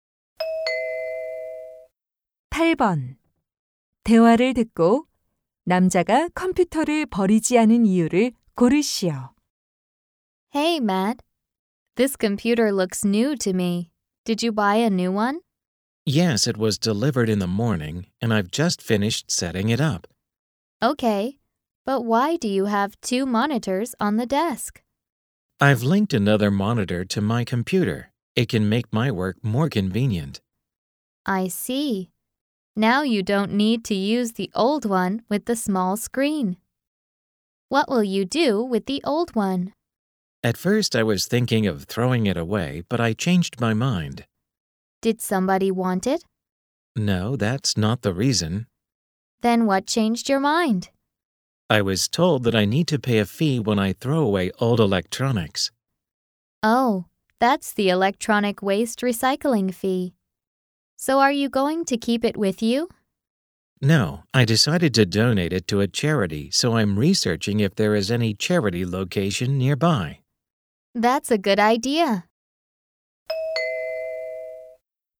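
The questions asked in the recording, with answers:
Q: 대화를 듣고 남자가 컴퓨터를 버리지 않은 이유를 고르시오.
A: 폐가전을 버리려면 수수료를 내야 해서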